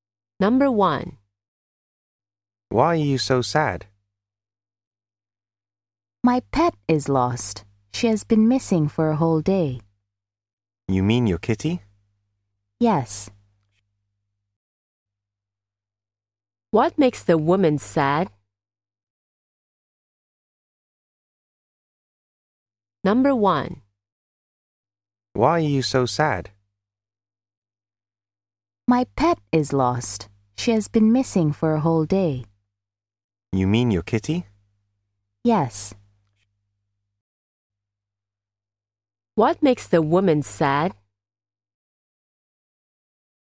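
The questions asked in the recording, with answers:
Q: What makes the woman sad?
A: Her pet cat is lost.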